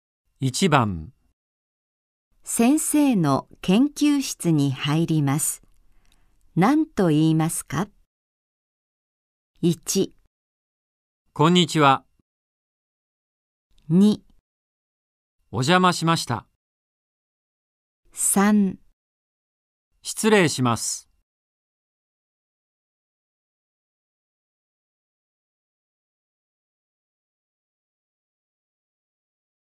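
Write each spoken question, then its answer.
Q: 先生の研究室に入ります。何と言いますか?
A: 3: 失礼します。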